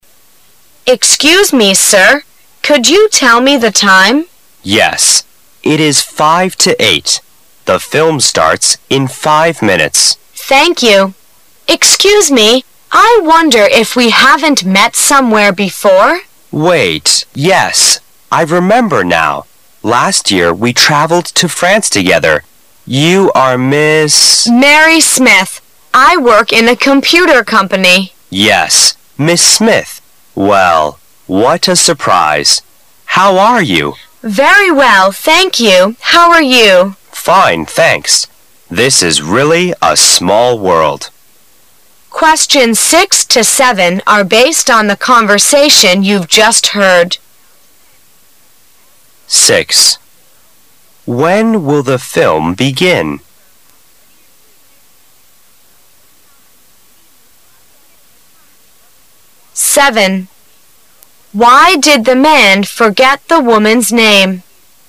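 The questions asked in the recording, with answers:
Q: When will the film begin?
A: At 8 o'clock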